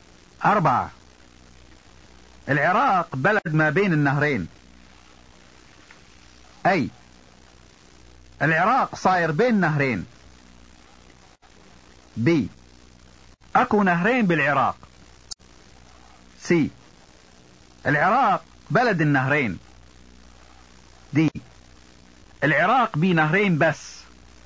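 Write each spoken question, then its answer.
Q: العراق بلد ما بين النهرين.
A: C: العراق بلد النهرين.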